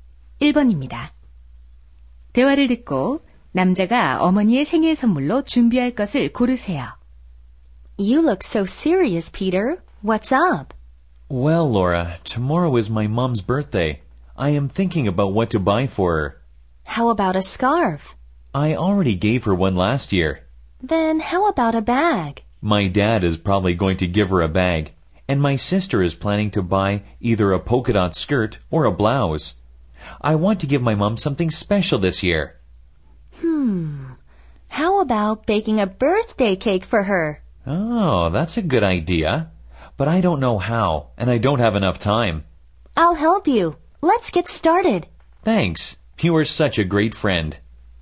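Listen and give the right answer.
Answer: 생일 케이크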